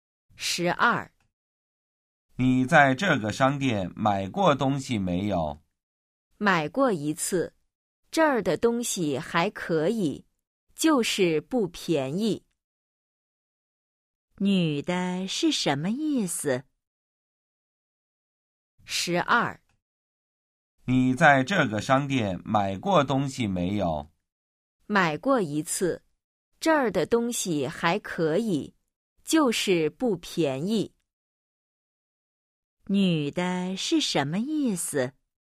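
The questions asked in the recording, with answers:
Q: 女的是什么意思?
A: 这个商店的东西还可以,就是不便宜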